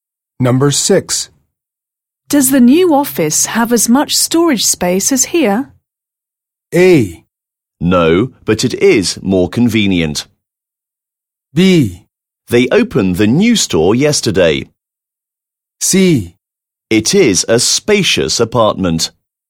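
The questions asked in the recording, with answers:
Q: Does the new office have as much storage space as here?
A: A: No, but it is more convenient.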